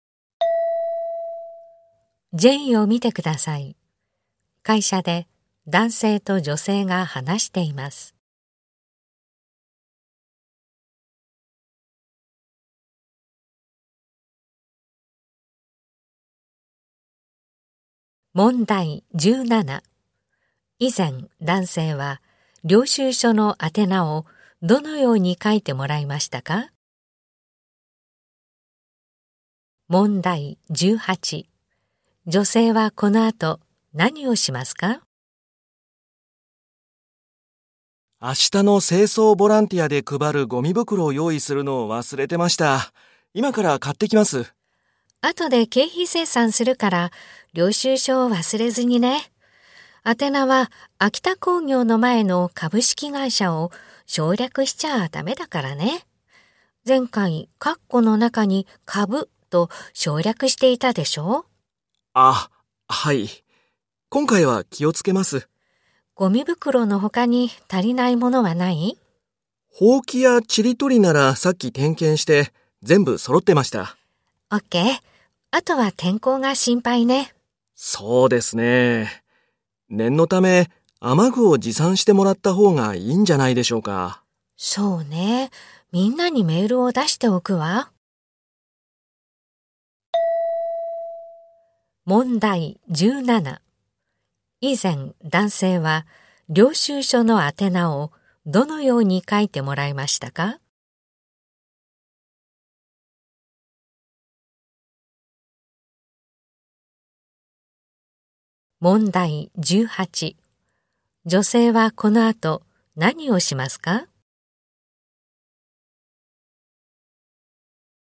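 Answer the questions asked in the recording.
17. (株)秋田工業
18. みんなに雨具持参のメールを出す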